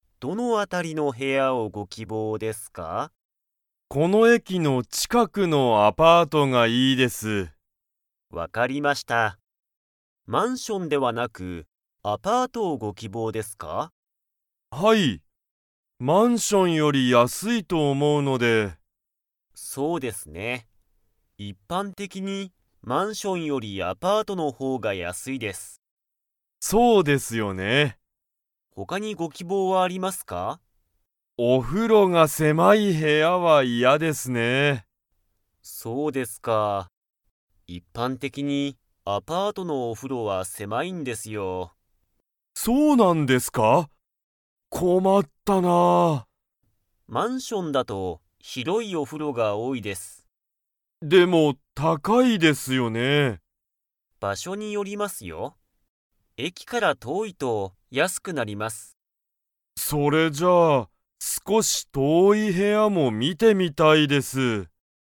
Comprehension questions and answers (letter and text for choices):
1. 一般的いっぱんてきに、マンションよりアパートの方ほうが高たかいですか?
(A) はい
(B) いいえ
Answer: (B) いいえ

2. 田中たなかさんは、 が狭せまい部屋へやは嫌いやだ。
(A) お風呂ふろ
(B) マンション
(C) アパート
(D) 駅えき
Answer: (A) お風呂ふろ

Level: Level 4